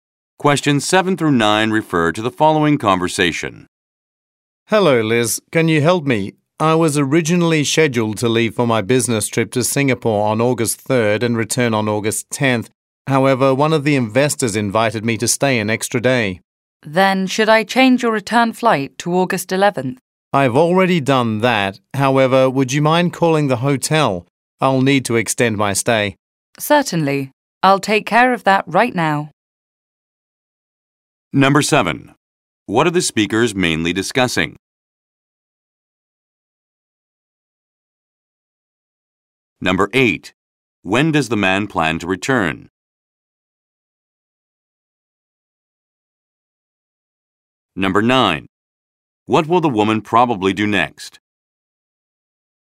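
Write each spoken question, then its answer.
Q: What are the speakers mainly discussing?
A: Changes to the man's business trip to Singapore

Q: When does the man plan to return?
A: August 11th

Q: What will the woman probably do next?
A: Call the hotel to extend his stay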